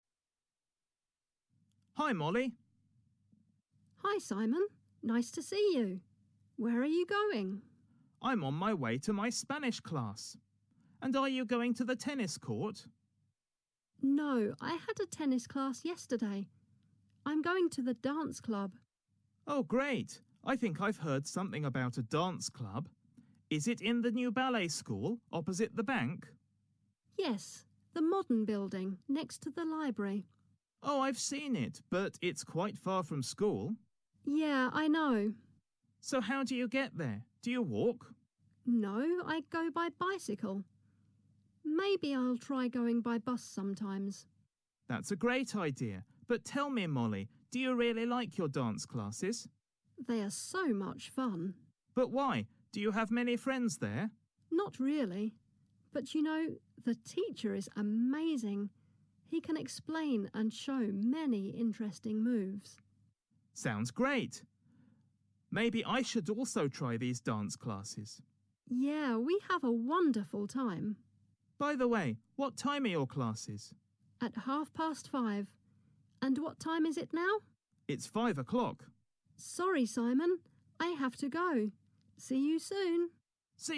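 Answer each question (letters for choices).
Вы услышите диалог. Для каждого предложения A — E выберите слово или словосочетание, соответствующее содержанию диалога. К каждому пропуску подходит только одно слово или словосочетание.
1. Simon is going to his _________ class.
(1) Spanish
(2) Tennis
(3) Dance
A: 1

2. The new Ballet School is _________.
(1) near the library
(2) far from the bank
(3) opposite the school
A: 1

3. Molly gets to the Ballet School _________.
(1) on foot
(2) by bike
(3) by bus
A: 2

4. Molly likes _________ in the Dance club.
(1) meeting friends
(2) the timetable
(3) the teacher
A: 3

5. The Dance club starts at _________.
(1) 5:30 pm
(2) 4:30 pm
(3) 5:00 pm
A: 1

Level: 8 «A, V»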